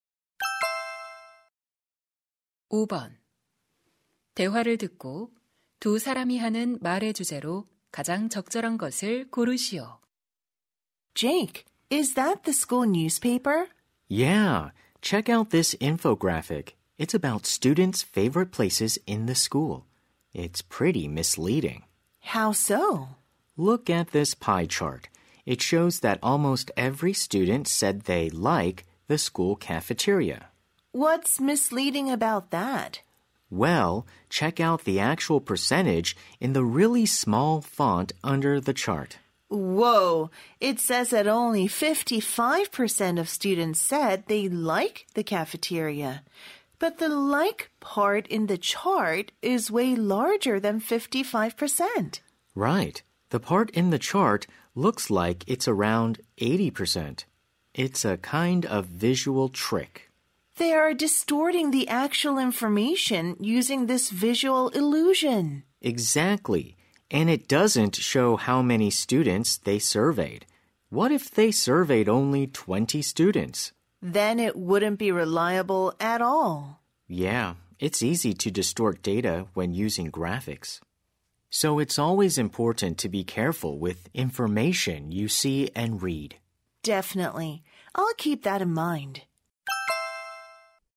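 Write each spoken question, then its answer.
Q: 대화를 듣고 두 사람이 하는 말의 주제로 가장 적절한 것을 고르시오.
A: 그래픽을 이용한 정보 왜곡에 주의할 필요성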